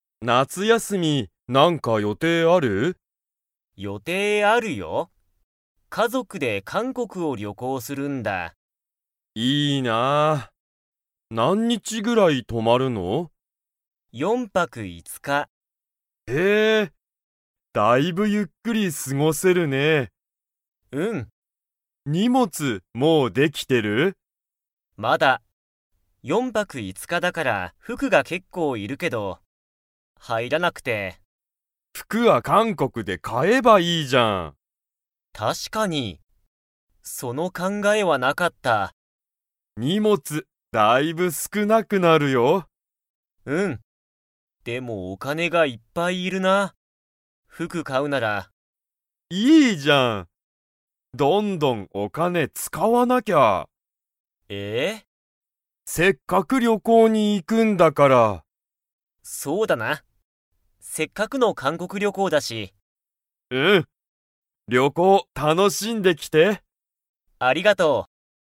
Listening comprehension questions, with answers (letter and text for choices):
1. さとしは、夏休なつやすみどこに行いきますか?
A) 韓国かんこく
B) 東京とうきょう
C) 中国ちゅうごく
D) アメリカ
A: A) 韓国かんこく

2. さとしの荷物にもつは 。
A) もうできてる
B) まだできてない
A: B) まだできてない

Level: Level 4